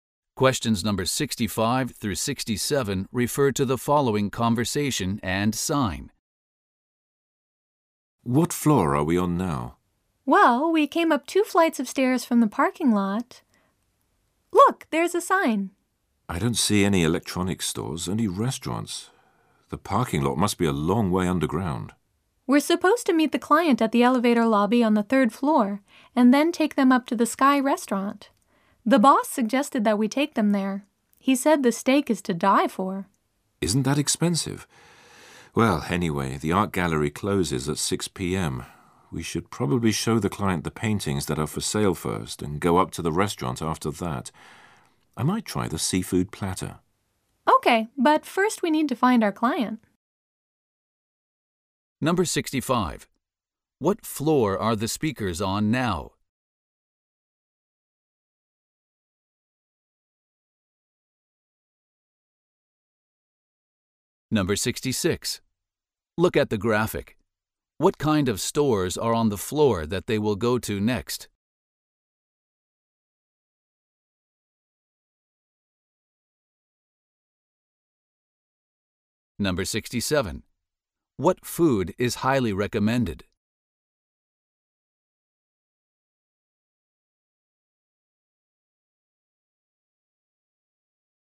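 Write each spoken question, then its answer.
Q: What food is highly recommended?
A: The steak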